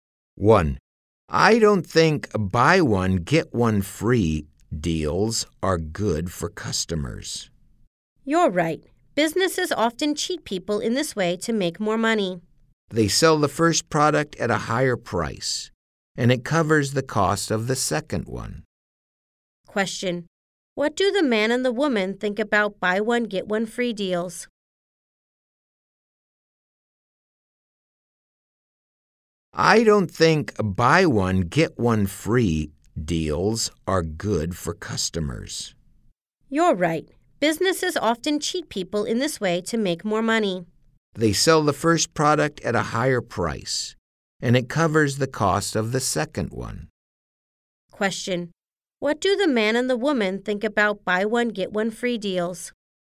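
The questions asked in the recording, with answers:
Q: What do the man and the woman think about buy one, get one free deals?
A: They think the deals are not good for customers; businesses use them to cheat people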